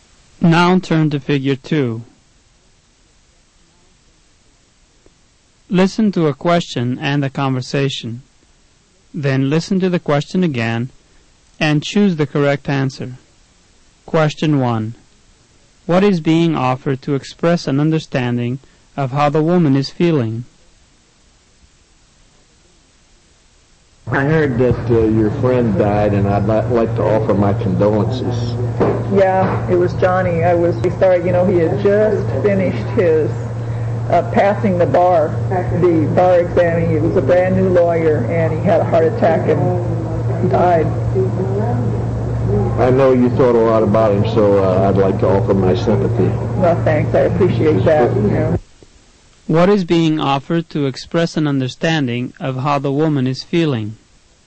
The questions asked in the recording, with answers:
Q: What is being offered to express an understanding of how the woman is feeling?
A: The correct answer is C, condolences and sympathy.